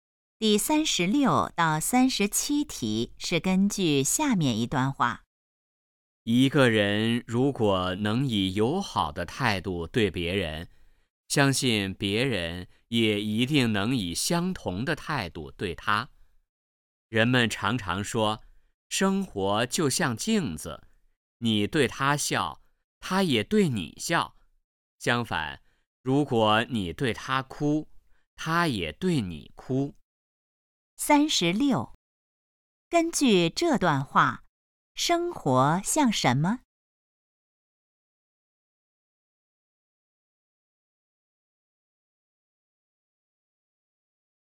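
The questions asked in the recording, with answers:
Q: 根据这段话,生活像什么?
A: 镜子

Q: 这段话主要谈什么?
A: 要以友好的态度对待别人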